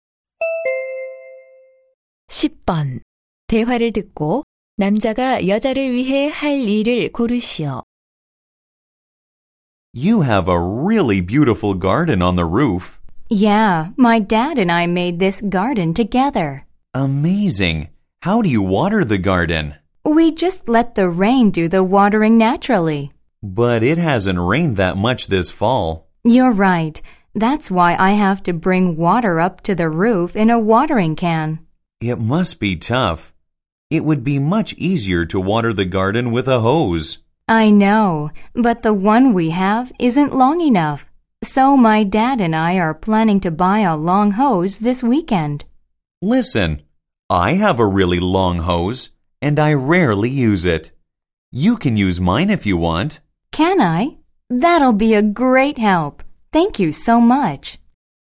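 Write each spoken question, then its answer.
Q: 대화를 듣고 남자가 여자를 위해 할 일을 고르시오.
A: 긴 호스 빌려주기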